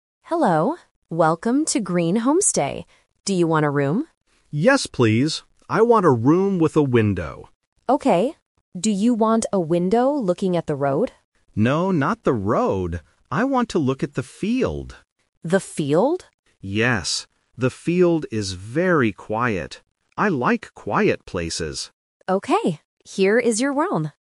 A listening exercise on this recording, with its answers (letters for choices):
Listen to the conversation and choose the correct answer (A, B, or C).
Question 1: What does the customer want in the room?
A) A TV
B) A window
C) A big bed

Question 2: What does the customer want to look at from the window?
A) The road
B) The river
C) The field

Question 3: Why does the customer like the field?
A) Because it is quiet.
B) Because it is beautiful.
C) Because it is big.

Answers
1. B
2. C
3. A

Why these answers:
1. The customer clearly says, "I want a room with a window." Options (A) and (C) are common things in a hotel room, but they are not mentioned in the audio.
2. The customer says, "I want to look at the field." Option (A) "The road" is a trap because the receptionist asks about it, but the customer rejects it by saying "No, not the road." Option (B) is not mentioned.
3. The customer states, "The field is very quiet." Options (B) and (C) are positive adjectives but are not used in the conversation.

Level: A1